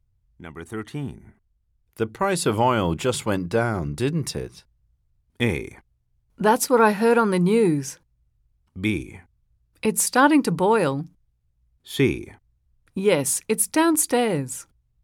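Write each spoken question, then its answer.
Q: The price of oil just went down, didn't it?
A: A: That's what I heard on the news.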